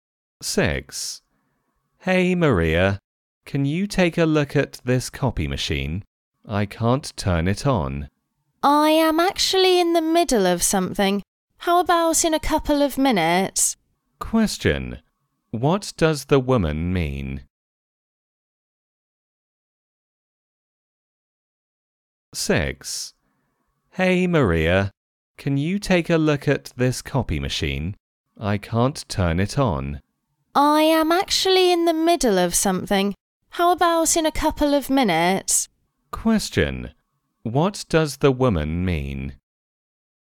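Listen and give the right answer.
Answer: She is busy now but will help in a couple of minutes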